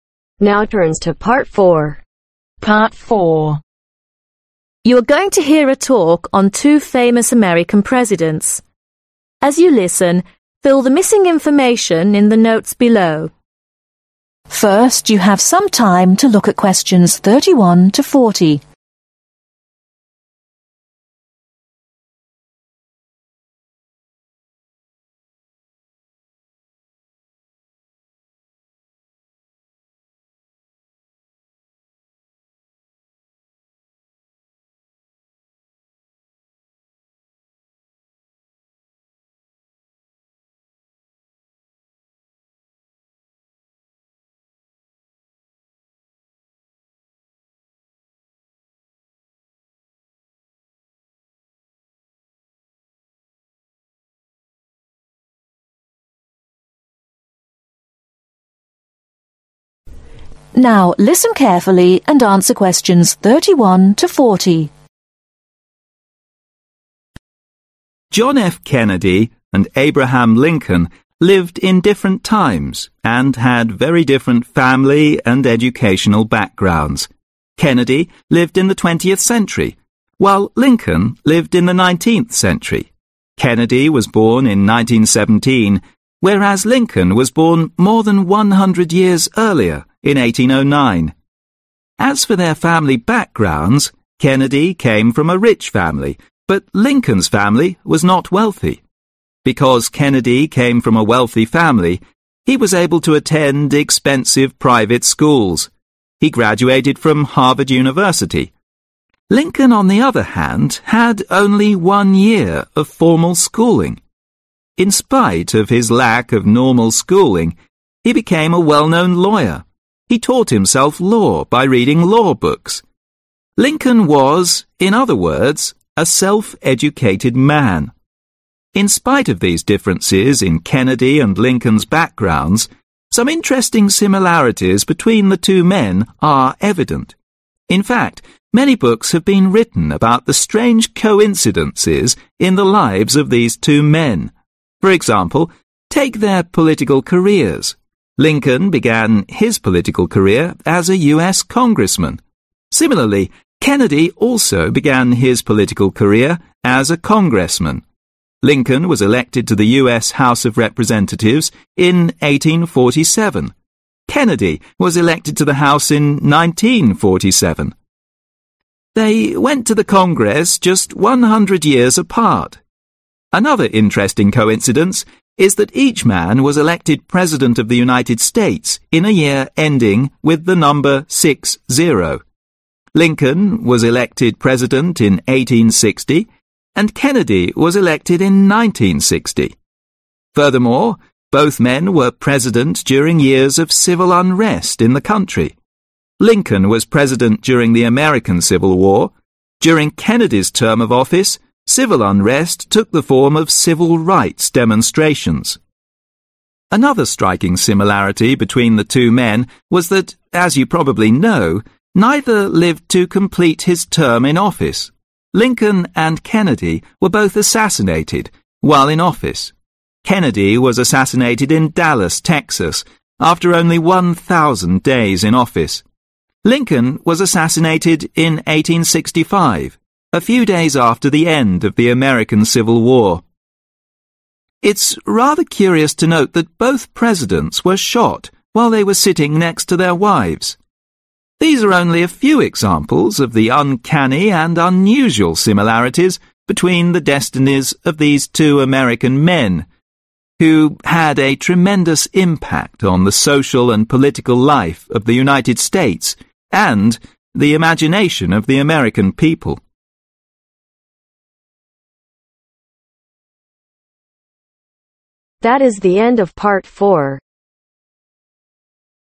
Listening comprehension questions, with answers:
Complete the notes below. Write NO MORE THAN TWO WORDS OR A NUMBER for each answer.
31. Kennedy was born in (31)............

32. whereas Lincoln was born more than (32)............ earlier.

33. In spite of his lack of (33)............ be become a well known lawyer.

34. He was a (34)............ man.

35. Some interesting (35)............ between the two men are evident.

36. Both of them began their political career as a (36)............ .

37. The United states in a year ending with the number (37)............ .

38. Furthermore, both men were President during years of civil (38)............ in the country.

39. Both of them died by (39)............ while in office.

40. Both Presidents were shot while they were sitting next to their (40)............ .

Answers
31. 1917
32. 100 years
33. Normal schooling
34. Self educated
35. Similarities
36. Congressman
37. 60
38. Unrest
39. Assassination
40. Wives